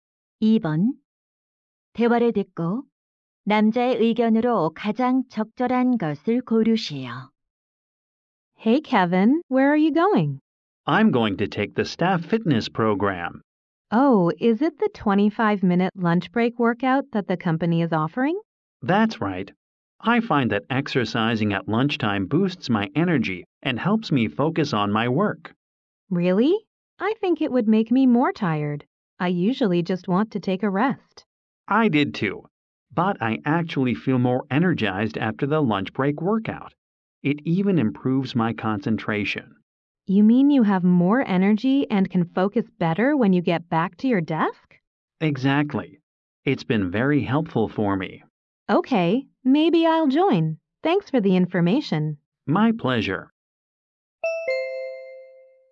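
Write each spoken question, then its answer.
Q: 대화를 듣고 남자의 의견으로 가장 적절한 것을 고르시오.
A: 점심시간 운동은 활력과 업무 집중력을 높여 준다.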